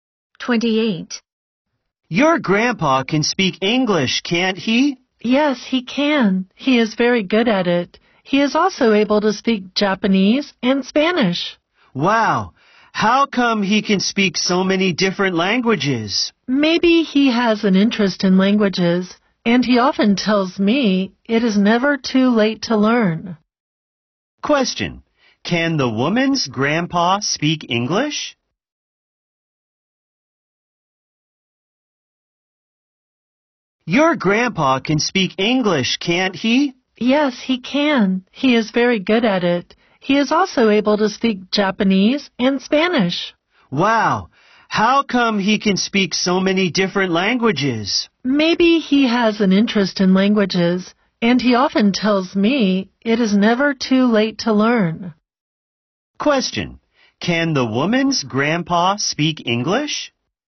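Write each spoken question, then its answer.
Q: can the woman's grandpa speak English?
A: Yes, he can.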